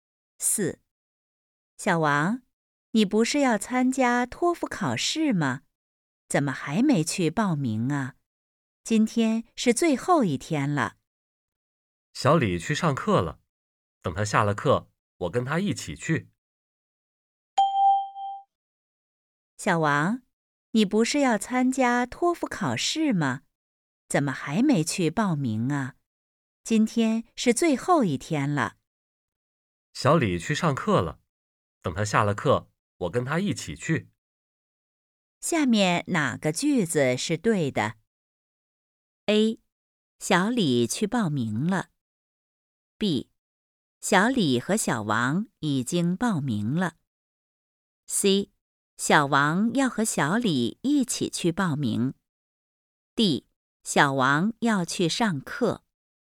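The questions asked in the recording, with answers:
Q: 下面哪个句子是对的?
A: C: 小王要和小李一起去报名。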